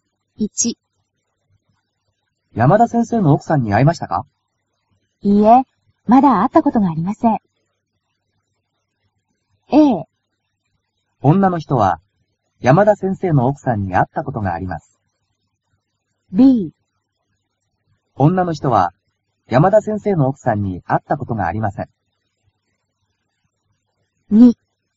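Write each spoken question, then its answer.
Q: 女の人は、山田先生の奥さんに会ったことがあります。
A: B: 女の人は、山田先生の奥さんに会ったことがありません。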